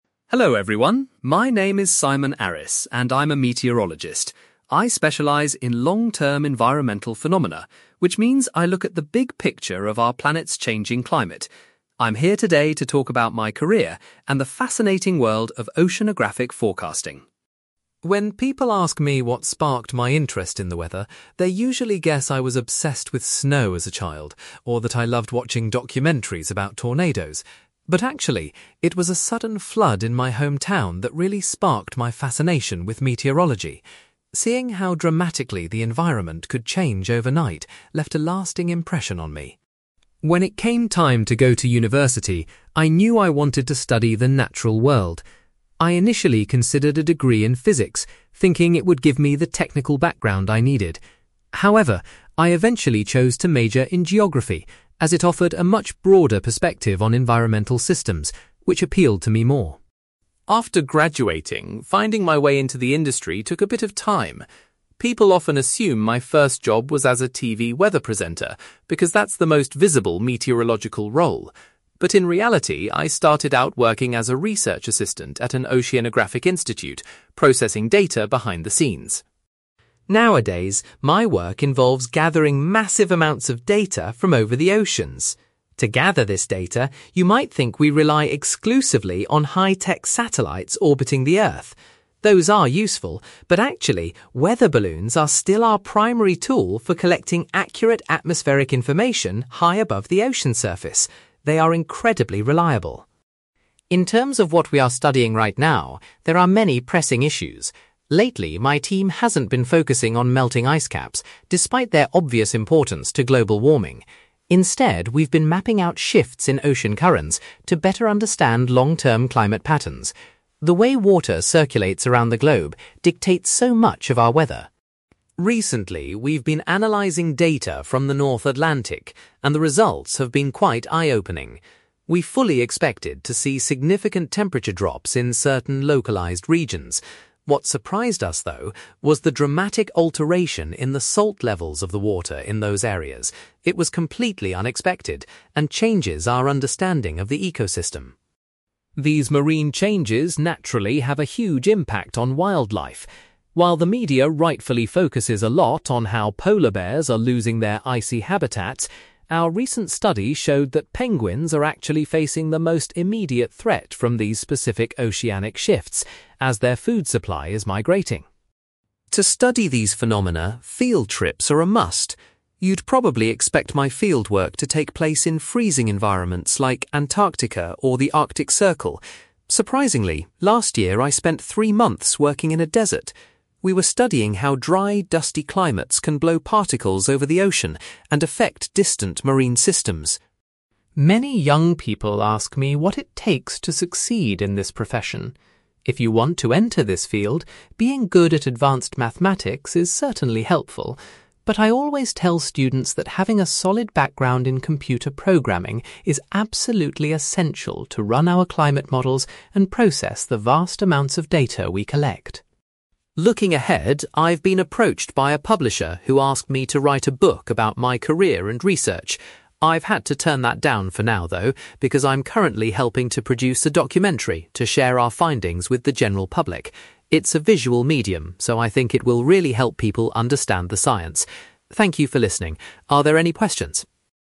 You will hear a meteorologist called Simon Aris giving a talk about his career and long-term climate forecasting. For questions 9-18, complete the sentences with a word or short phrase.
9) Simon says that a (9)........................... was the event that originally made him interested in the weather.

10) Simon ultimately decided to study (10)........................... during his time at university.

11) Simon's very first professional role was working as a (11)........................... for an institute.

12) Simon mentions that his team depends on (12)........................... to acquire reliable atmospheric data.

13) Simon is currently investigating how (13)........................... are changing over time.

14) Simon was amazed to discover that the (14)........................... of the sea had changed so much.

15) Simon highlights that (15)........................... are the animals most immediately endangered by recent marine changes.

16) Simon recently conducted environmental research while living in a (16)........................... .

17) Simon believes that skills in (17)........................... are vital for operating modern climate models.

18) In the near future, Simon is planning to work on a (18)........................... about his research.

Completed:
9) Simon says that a flood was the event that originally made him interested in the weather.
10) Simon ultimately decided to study geography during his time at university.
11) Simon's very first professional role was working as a research assistant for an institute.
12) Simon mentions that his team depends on weather balloons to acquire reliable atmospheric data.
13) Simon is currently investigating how ocean currents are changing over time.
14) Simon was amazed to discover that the salt levels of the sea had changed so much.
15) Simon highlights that penguins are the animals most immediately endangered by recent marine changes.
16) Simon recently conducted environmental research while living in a desert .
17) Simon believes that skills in computer programming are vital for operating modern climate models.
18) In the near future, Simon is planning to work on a documentary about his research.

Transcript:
Simon: Hello everyone, my name is Simon Aris, and I'm a meteorologist. I specialise in long-term environmental phenomena, which means I look at the big picture of our planet's changing climate. I'm here today to talk about my career and the fascinating world of oceanographic forecasting.
When people ask me what sparked my interest in the weather, they usually guess I was obsessed with snow as a child or that I loved watching documentaries about tornadoes. But actually, it was a sudden flood in my hometown that really sparked my fascination with meteorology. Seeing how dramatically the environment could change overnight left a lasting impression on me.
When it came time to go to university, I knew I wanted to study the natural world. I initially considered a degree in physics, thinking it would give me the technical background I needed. However, I eventually chose to major in geography, as it offered a much broader perspective on environmental systems, which appealed to me more.
After graduating, finding my way into the industry took a bit of time. People often assume my first job was as a TV weather presenter because that's the most visible meteorological role. But in reality, I started out working as a research assistant at an oceanographic institute, processing data behind the scenes.
Nowadays, my work involves gathering massive amounts of data from over the oceans. To gather this data, you might think we rely exclusively on high-tech satellites orbiting the Earth. Those are useful, but actually, weather balloons are still our primary tool for collecting accurate atmospheric information high above the ocean surface. They are incredibly reliable.
In terms of what we are studying right now, there are many pressing issues. Lately, my team hasn't been focusing on melting ice caps, despite their obvious importance to global warming. Instead, we've been mapping out shifts in ocean currents to better understand long-term climate patterns. The way water circulates around the globe dictates so much of our weather.
Recently, we've been analysing data from the North Atlantic, and the results have been quite eye-opening. We fully expected to see significant temperature drops in certain localized regions. What surprised us, though, was the dramatic alteration in the salt levels of the water in those areas. It was completely unexpected and changes our understanding of the ecosystem.
These marine changes naturally have a huge impact on wildlife. While the media rightfully focuses a lot on how polar bears are losing their icy habitats, our recent study showed that penguins are actually facing the most immediate threat from these specific oceanic shifts, as their food supply is migrating.
To study these phenomena, field trips are a must. You'd probably expect my fieldwork to take place in freezing environments like Antarctica or the Arctic Circle. Surprisingly, last year I spent three months working in a desert. We were studying how dry, dusty climates can blow particles over the ocean and affect distant marine systems.
Many young people ask me what it takes to succeed in this profession. If you want to enter this field, being good at advanced mathematics is certainly helpful. But I always tell students that having a solid background in computer programming is absolutely essential to run our climate models and process the vast amounts of data we collect.
Looking ahead, I've been approached by a publisher who asked me to write a book about my career and research. I've had to turn that down for now, though, because I'm currently helping to produce a documentary to share our findings with the general public. It's a visual medium, so I think it will really help people understand the science. Thank you for listening, are there any questions?

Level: B2